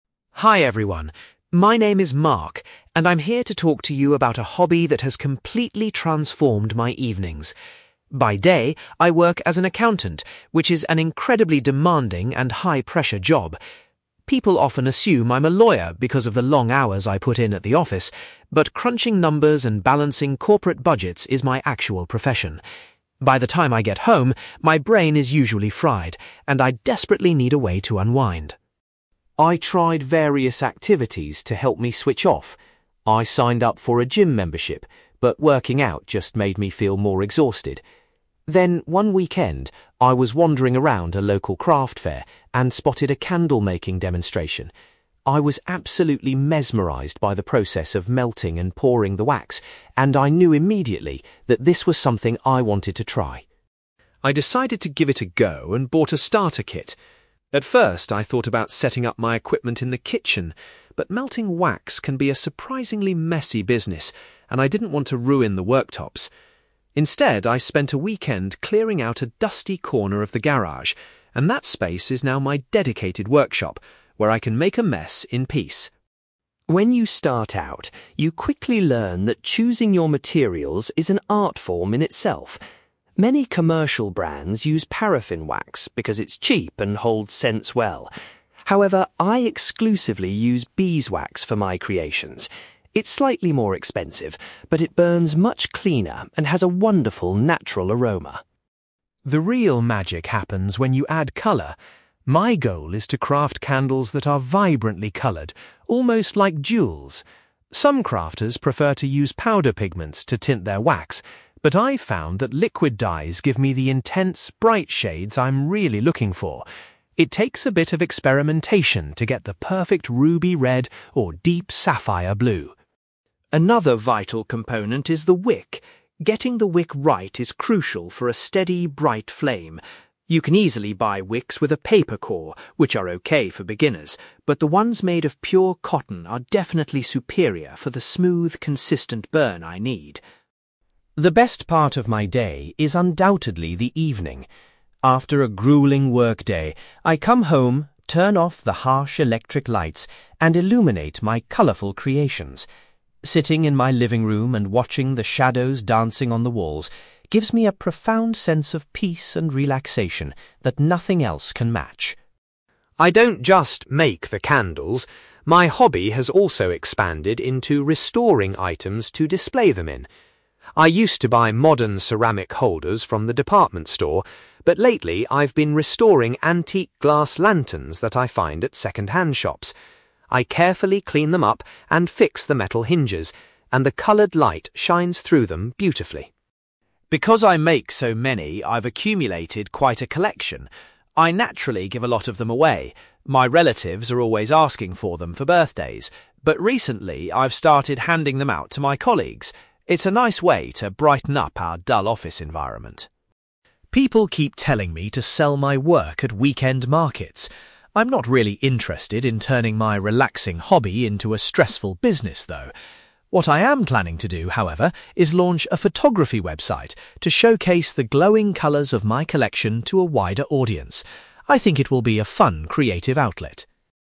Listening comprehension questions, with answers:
You will hear a man called Mark talking about his hobby of making and illuminating colourful candles. For questions 9-18, complete the sentences with a word or short phrase.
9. Mark's demanding daily job as an (9)........................... causes him a lot of stress.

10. Mark first became inspired to make candles after visiting a (10)........................... .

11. Mark decided that the (11)........................... was the most suitable place to set up his workshop.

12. Unlike many commercial brands, Mark uses (12)........................... as the main material for his candles.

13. To achieve the bright colours he wants, Mark prefers to use (13)........................... in his wax.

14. Mark believes that wicks made of (14)........................... provide the best and smoothest flame.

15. Mark loves watching the (15)........................... on his walls when he lights his candles in the evening.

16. Mark currently spends time restoring vintage (16)........................... to hold his handmade candles.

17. Mark has recently been giving some of his candles to his (17)........................... to cheer up their workplace.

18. In the future, Mark plans to set up a (18)........................... to share the visual beauty of his collection.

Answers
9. accountant
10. craft fair
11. garage
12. beeswax
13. liquid dyes
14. cotton
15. shadows
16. glass lanterns
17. colleagues
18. photography website

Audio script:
Mark: Hi everyone, my name is Mark, and I'm here to talk to you about a hobby that has completely transformed my evenings. By day, I work as an accountant, which is an incredibly demanding and high-pressure job. People often assume I'm a lawyer because of the long hours I put in at the office, but crunching numbers and balancing corporate budgets is my actual profession. By the time I get home, my brain is usually fried, and I desperately need a way to unwind.
I tried various activities to help me switch off. I signed up for a gym membership, but working out just made me feel more exhausted. Then, one weekend, I was wandering around a local craft fair and spotted a candle-making demonstration. I was absolutely mesmerised by the process of melting and pouring the wax, and I knew immediately that this was something I wanted to try.
I decided to give it a go and bought a starter kit. At first, I thought about setting up my equipment in the kitchen, but melting wax can be a surprisingly messy business, and I didn't want to ruin the worktops. Instead, I spent a weekend clearing out a dusty corner of the garage, and that space is now my dedicated workshop, where I can make a mess in peace.
When you start out, you quickly learn that choosing your materials is an art form in itself. Many commercial brands use paraffin wax because it's cheap and holds scents well. However, I exclusively use beeswax for my creations. It's slightly more expensive, but it burns much cleaner and has a wonderful, natural aroma.
The real magic happens when you add colour. My goal is to craft candles that are vibrantly coloured, almost like jewels. Some crafters prefer to use powder pigments to tint their wax, but I've found that liquid dyes give me the intense, bright shades I'm really looking for. It takes a bit of experimentation to get the perfect ruby red or deep sapphire blue.
Another vital component is the wick. Getting the wick right is crucial for a steady, bright flame. You can easily buy wicks with a paper core, which are okay for beginners, but the ones made of pure cotton are definitely superior for the smooth, consistent burn I need.
The best part of my day is undoubtedly the evening. After a grueling workday, I come home, turn off the harsh electric lights, and illuminate my colourful creations. Sitting in my living room and watching the shadows dancing on the walls gives me a profound sense of peace and relaxation that nothing else can match.
I don't just make the candles; my hobby has also expanded into restoring items to display them in. I used to buy modern ceramic holders from the department store, but lately, I've been restoring antique glass lanterns that I find at second-hand shops. I carefully clean them up and fix the metal hinges, and the coloured light shines through them beautifully.
Because I make so many, I've accumulated quite a collection. I naturally give a lot of them away. My relatives are always asking for them for birthdays, but recently, I've started handing them out to my colleagues. It's a nice way to brighten up our dull office environment.
People keep telling me to sell my work at weekend markets. I'm not really interested in turning my relaxing hobby into a stressful business, though. What I am planning to do, however, is launch a photography website to showcase the glowing colours of my collection to a wider audience. I think it will be a fun creative outlet.

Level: B2